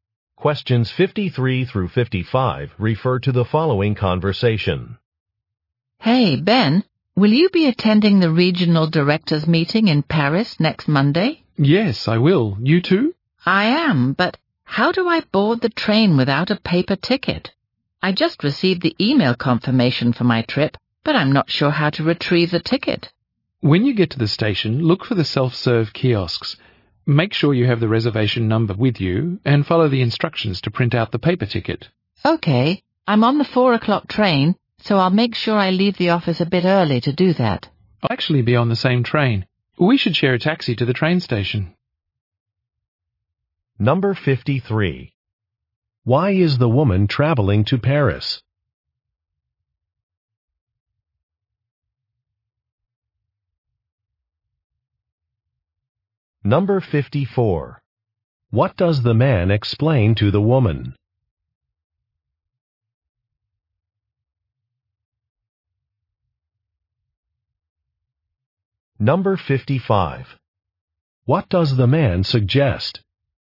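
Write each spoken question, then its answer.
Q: Why is the woman traveling to Paris?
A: To attend a regional directors meeting

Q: What does the man explain to the woman?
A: How to print her ticket at a kiosk

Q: What does the man suggest?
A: Sharing a taxi to the station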